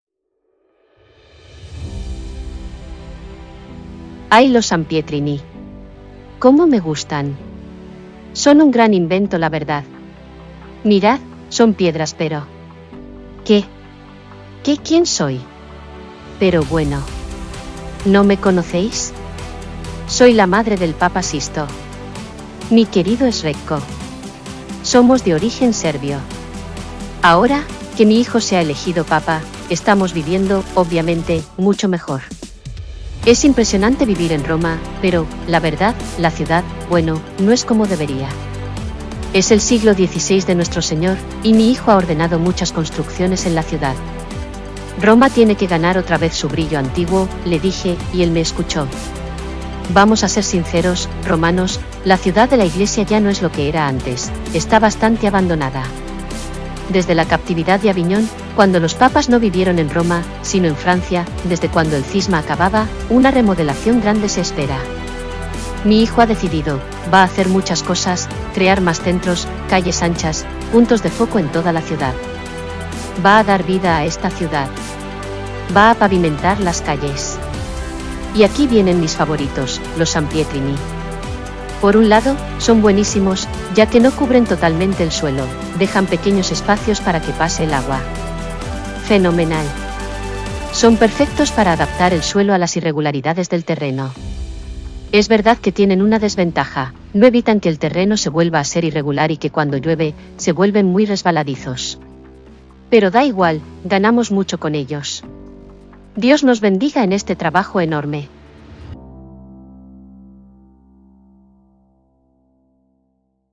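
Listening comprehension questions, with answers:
¿Cómo se llaman las piedras del pavimento especial, muy común en Roma? Las estás pisando también en el Campo di Fiori.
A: Sampietrini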